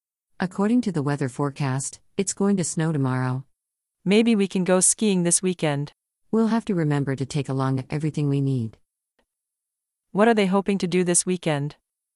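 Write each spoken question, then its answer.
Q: What are they hoping to do this weekend?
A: Go skiing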